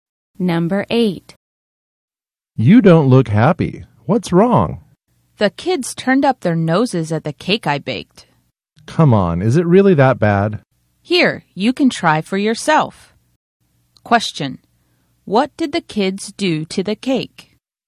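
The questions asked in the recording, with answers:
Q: What did the kids do to the cake?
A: They turned up their noses at it (refused it)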